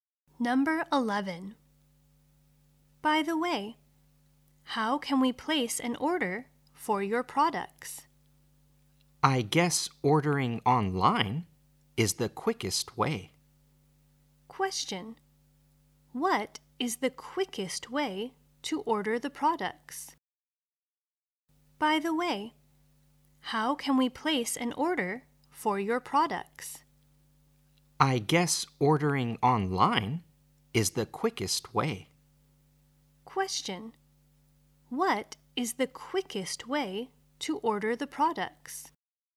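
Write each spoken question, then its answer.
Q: What is the quickest way to order the products?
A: Ordering online.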